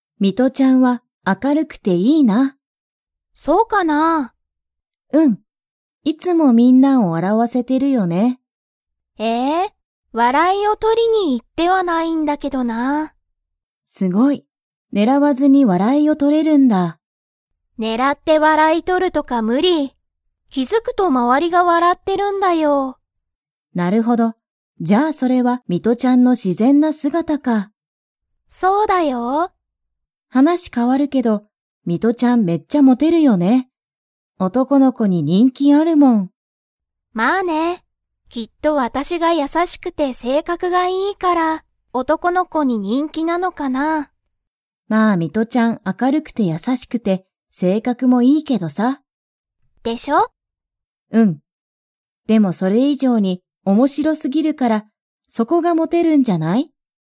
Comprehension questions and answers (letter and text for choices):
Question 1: ミトちゃんは、いつもみんなを 。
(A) 怒おこらせてる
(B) 笑わらわせてる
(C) 驚おどろかせてる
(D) 怖こわがらせてる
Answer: (B) 笑わらわせてる

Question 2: ミトちゃんは、男おとこの子こに人気にんきが 。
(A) ある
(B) ない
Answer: (A) ある

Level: Level 4